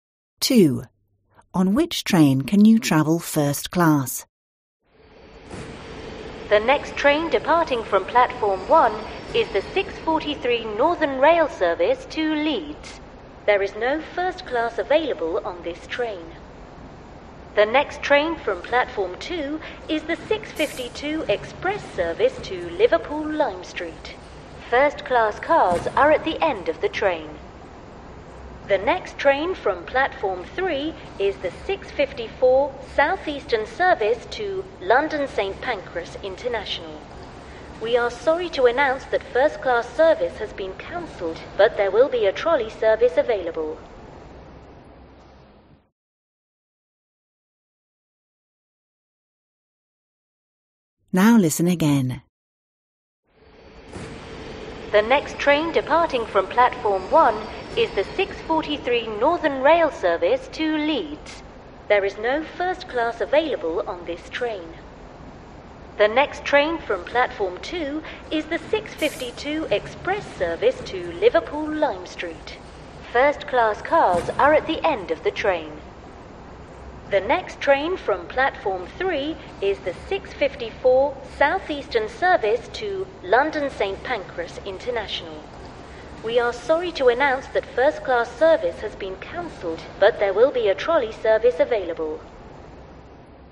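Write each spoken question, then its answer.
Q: On which train can you travel first class?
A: The 6:52 Express to Liverpool Lime Street (Platform 2)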